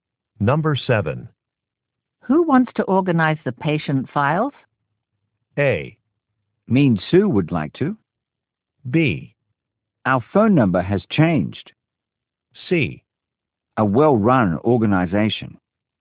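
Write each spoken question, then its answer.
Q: Who wants to organize the patient files?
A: A: Mean Sue would like to.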